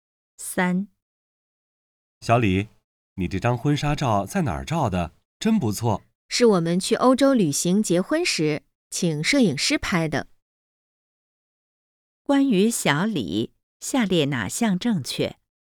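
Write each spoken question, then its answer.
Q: 关于小李,下列哪项正确?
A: 他在欧洲旅行结婚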